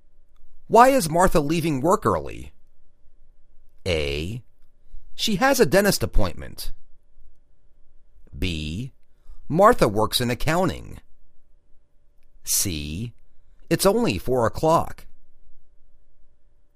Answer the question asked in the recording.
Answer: She has a dentist appointment